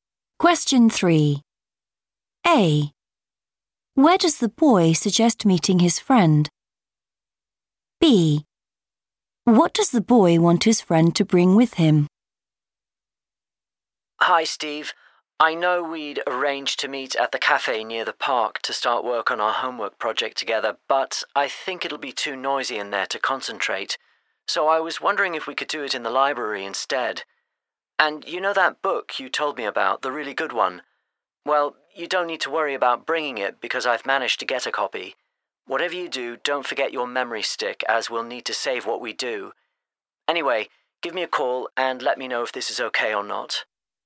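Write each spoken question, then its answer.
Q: Where does the boy suggest meeting his friend?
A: the library

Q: What does the boy want his friend to bring with him?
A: memory stick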